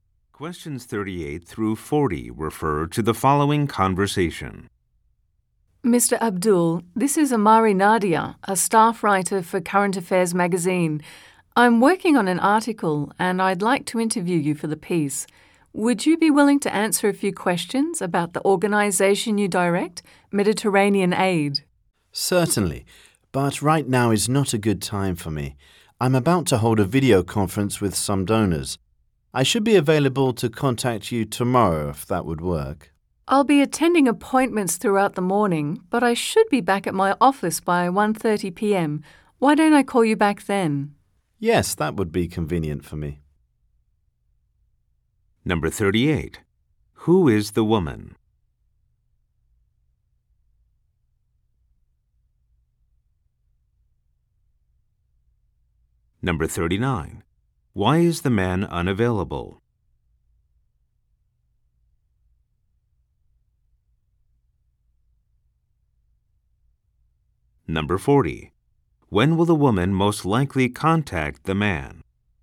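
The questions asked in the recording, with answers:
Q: Who is the woman?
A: A magazine staff writer

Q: Why is the man unavailable?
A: He is about to hold a video conference with donors

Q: When will the woman most likely contact the man?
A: Tomorrow at 1:30 p.m.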